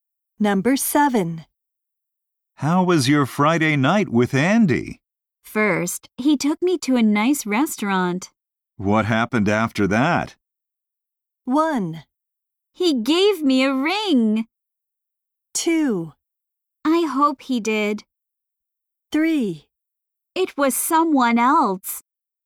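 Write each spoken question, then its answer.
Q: What happened after that?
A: 1: He gave me a ring.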